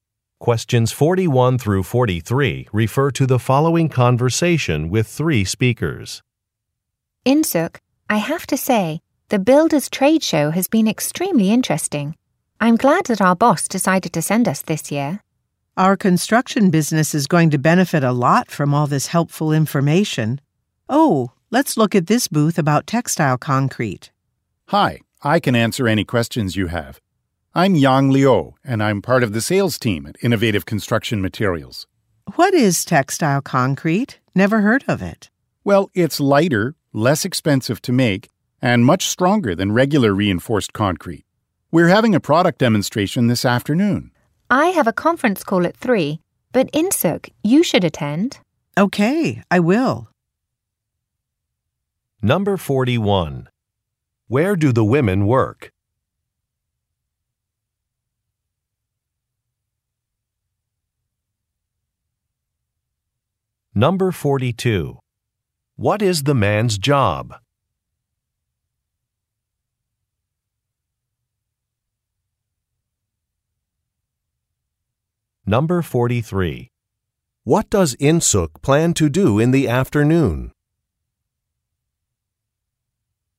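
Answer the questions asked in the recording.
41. At a construction business
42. Salesperson
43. Attend a product demonstration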